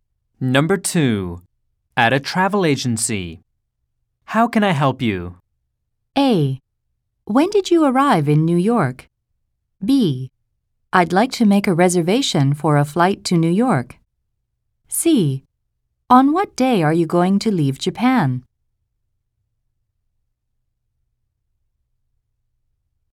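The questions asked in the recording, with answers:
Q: How can I help you?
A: B: I'd like to make a reservation for a flight to New York.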